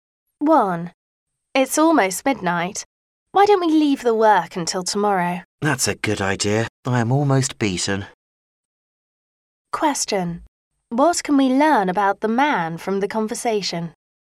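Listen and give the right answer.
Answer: He is very tired.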